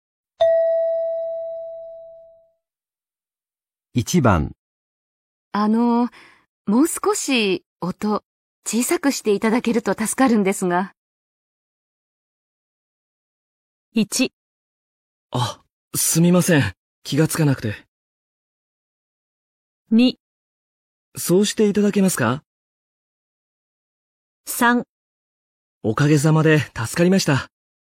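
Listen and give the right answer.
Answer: 1: あ、すみません。気がつかなくて。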